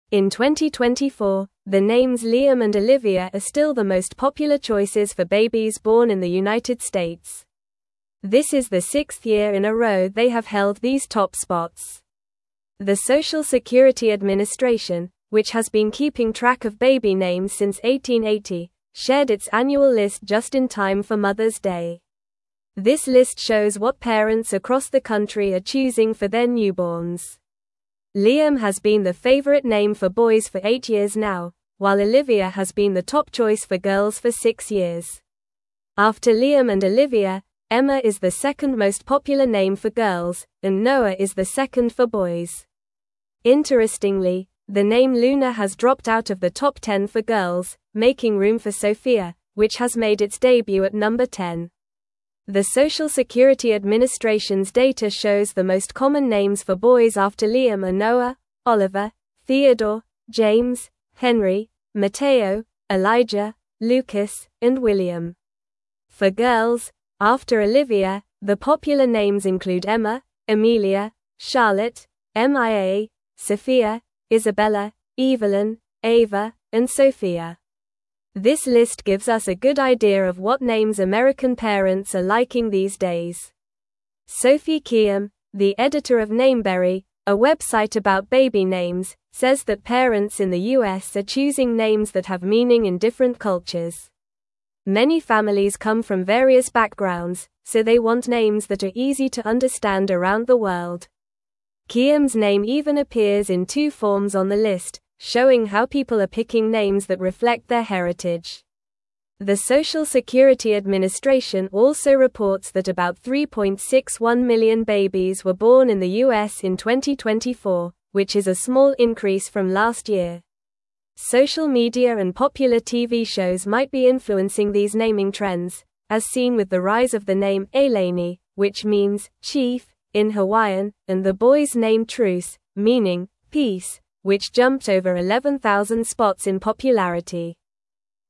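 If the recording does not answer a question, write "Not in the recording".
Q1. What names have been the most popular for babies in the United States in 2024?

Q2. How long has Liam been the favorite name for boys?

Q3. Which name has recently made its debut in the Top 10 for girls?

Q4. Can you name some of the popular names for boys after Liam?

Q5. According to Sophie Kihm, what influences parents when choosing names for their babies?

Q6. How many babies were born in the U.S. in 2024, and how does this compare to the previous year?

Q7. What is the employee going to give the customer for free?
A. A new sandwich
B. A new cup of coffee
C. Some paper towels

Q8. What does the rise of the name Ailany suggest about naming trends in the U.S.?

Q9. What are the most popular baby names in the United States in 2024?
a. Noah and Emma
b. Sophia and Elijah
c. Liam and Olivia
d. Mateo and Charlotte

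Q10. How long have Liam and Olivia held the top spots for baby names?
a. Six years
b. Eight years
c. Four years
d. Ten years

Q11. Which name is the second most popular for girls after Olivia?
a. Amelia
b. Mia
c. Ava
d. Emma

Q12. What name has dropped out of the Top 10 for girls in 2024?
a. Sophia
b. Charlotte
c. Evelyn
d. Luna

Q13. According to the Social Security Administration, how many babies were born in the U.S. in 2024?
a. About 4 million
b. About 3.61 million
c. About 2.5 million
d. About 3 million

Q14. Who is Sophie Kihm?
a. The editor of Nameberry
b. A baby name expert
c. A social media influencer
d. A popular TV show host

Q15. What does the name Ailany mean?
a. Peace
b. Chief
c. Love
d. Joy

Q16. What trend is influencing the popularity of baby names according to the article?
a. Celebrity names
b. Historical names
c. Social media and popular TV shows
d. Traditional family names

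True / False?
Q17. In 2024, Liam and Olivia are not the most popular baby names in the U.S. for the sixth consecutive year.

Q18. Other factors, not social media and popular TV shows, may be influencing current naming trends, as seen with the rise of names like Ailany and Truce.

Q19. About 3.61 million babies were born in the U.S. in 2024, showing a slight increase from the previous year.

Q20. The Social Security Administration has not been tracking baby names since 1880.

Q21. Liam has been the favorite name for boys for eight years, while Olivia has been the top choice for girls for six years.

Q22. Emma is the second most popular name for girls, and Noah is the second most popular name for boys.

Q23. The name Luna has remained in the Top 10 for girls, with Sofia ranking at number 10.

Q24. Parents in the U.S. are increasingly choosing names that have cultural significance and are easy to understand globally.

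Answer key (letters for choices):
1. Liam and Olivia have been the most popular names for babies in the United States in 2024.
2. Liam has been the favorite name for boys for eight years.
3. The name Sofia has recently made its debut in the Top 10 for girls.
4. Noah, Oliver, Theodore, James, Henry, Mateo, Elijah, Lucas and William
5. Parents are influenced by names that have meaning in different cultures and that are easy to understand around the world.
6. About 3.61 million, a small increase from the previous year
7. Not in the recording
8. The rise of the name Ailany suggests that naming trends in the U.S. are influenced by social media and popular culture.
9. c
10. a
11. d
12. d
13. b
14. a
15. b
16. c
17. False
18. False
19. True
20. False
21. True
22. True
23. False
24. True

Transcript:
In 2024, the names Liam and Olivia are still the most popular choices for babies born in the United States. 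This is the sixth year in a row they have held these top spots. The Social Security Administration, which has been keeping track of baby names since 1880, shared its annual list just in time for Mother's Day. This list shows what parents across the country are choosing for their newborns.
Liam has been the favorite name for boys for eight years now, while Olivia has been the top choice for girls for six years. After Liam and Olivia, Emma is the second most popular name for girls, and Noah is the second for boys. Interestingly, the name Luna has dropped out of the Top 10 for girls, making room for Sofia, which has made its debut at number 10.
The Social Security Administration's data shows the most common names for boys after Liam are Noah, Oliver, Theodore, James, Henry, Mateo, Elijah, Lucas, and William. For girls, after Olivia, the popular names include Emma, Amelia, Charlotte, Mia, Sophia, Isabella, Evelyn, Ava, and Sofia. 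This list gives us a good idea of what names American parents are liking these days.
Sophie Kihm, the editor of Nameberry, a website about baby names, says that parents in the U.S. are choosing names that have meaning in different cultures. Many families come from various backgrounds, so they want names that are easy to understand around the world. Kihm's name even appears in two forms on the list, showing how people are picking names that reflect their heritage. The Social Security Administration also reports that about 3.61 million babies were born in the U.S. in 2024, which is a small increase from last year. Social media and popular TV shows might be influencing these naming trends, as seen with the rise of the name Ailany, which means "chief" in Hawaiian, and the boys' name Truce, meaning "peace," which jumped over 11,000 spots in popularity.

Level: Level 3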